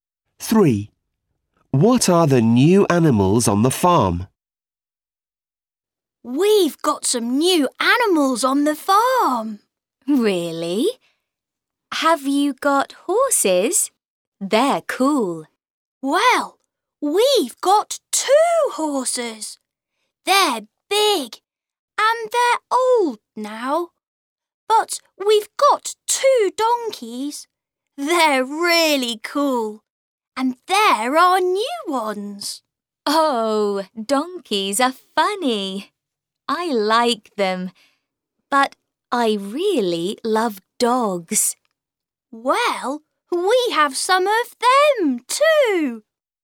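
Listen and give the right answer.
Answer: Donkeys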